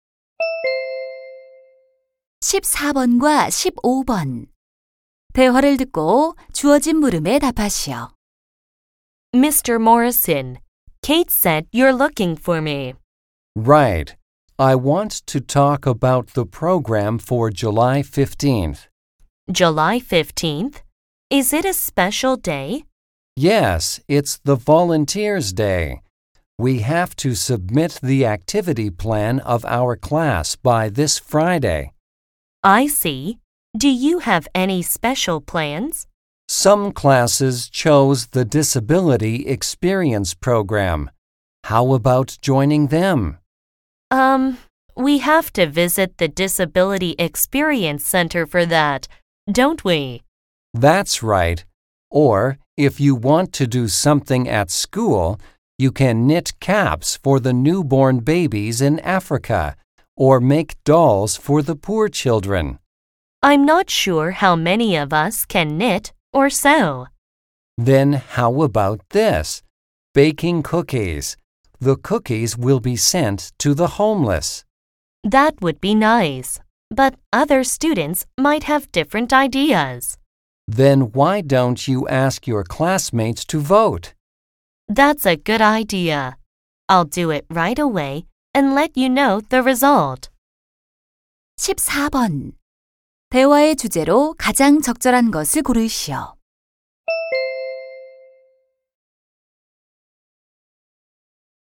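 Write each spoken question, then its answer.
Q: 대화의 주제로 가장 적절한 것을 고르시오.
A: 자원봉사의 날 학급 활동 정하기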